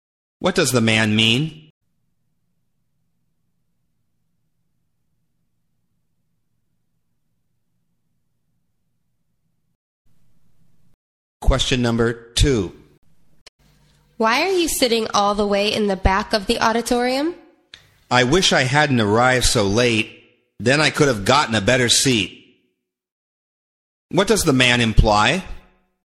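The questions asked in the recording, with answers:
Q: What does the man imply?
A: He arrived late, so he couldn't get a better seat.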